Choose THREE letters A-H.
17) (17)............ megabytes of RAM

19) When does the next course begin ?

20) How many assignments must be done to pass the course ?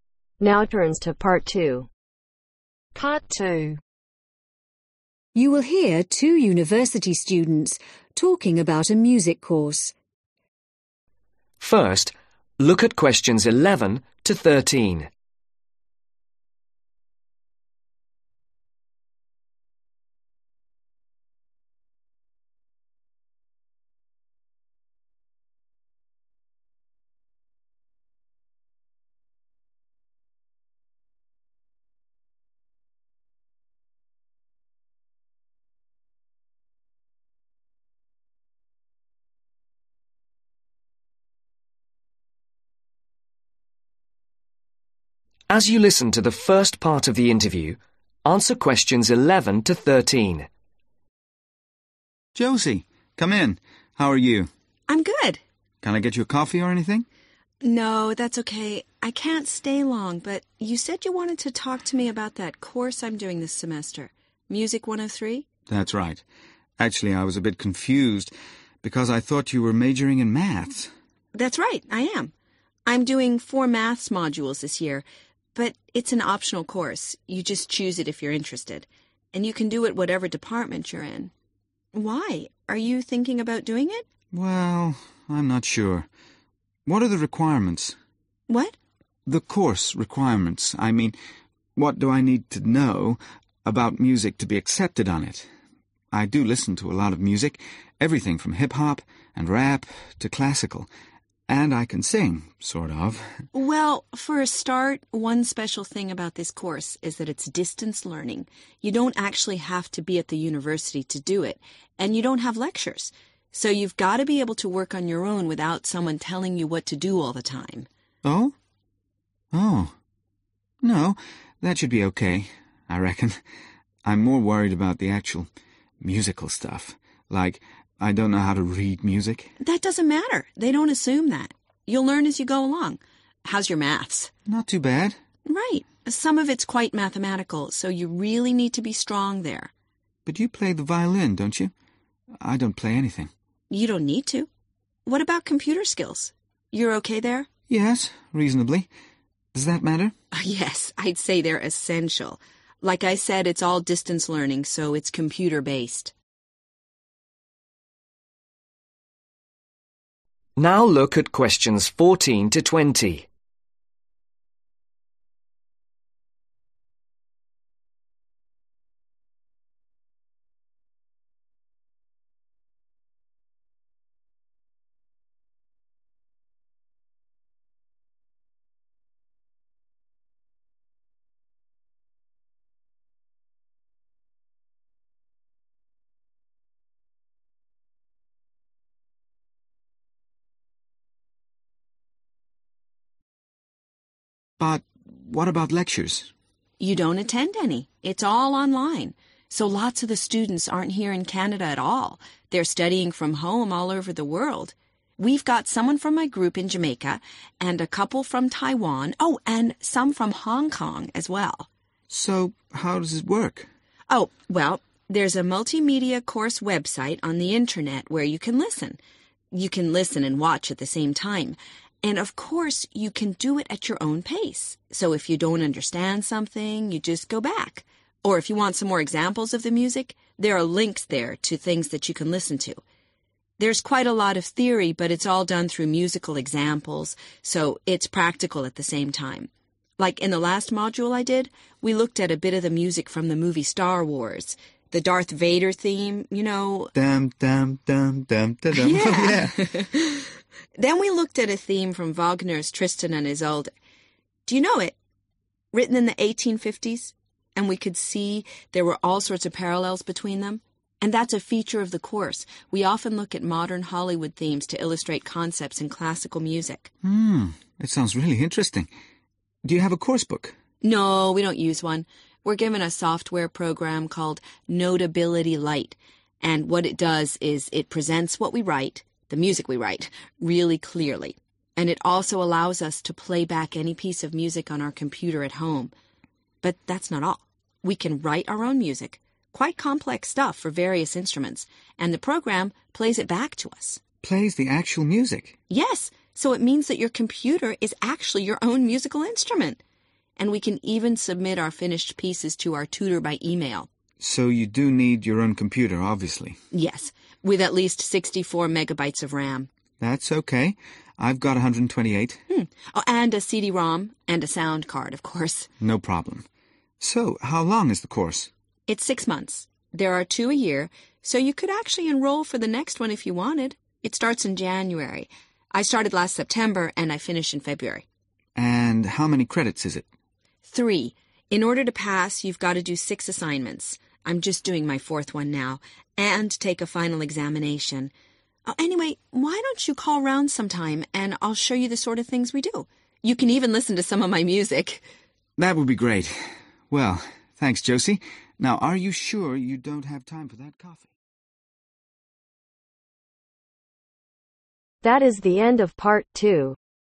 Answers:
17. 64 / sixty-four
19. January
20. 6 / six